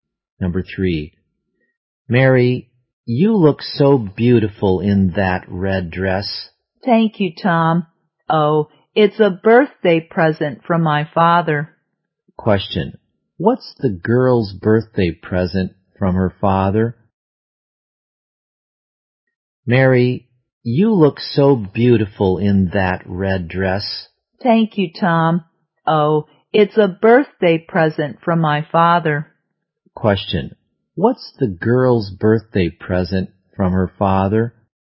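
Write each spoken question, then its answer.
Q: What's the girl's birthday present from her father?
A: A red dress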